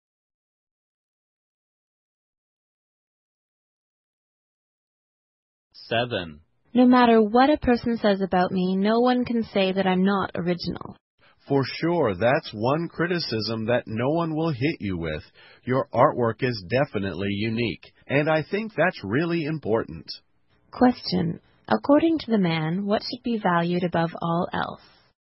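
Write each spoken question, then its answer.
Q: According to the man, what should be valued above all else?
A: Originality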